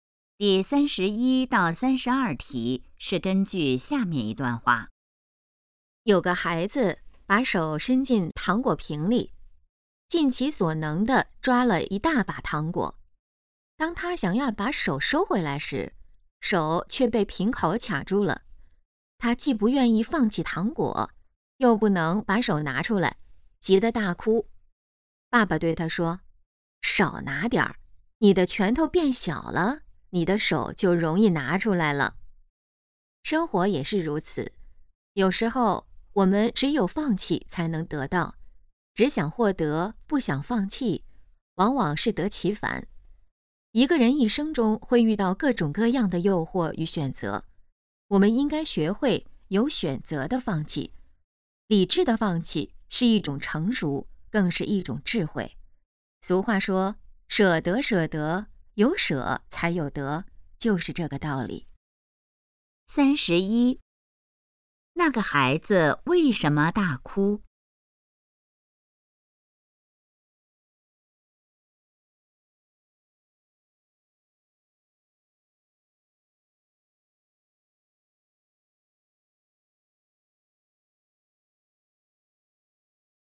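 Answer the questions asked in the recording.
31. 手被瓶口卡住了
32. 要学会有选择地放弃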